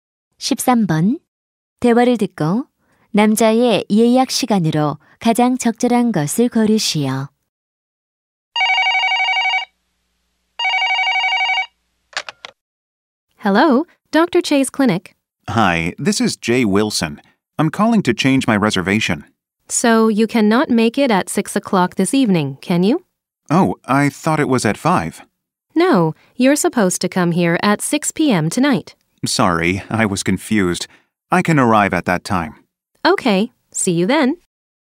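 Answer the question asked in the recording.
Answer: 오후 6시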